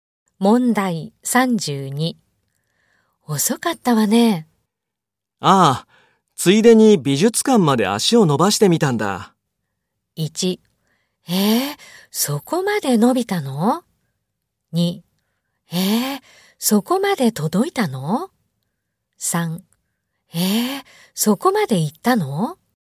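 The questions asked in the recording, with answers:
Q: 遅かったわね。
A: 3: そこまで行ったの?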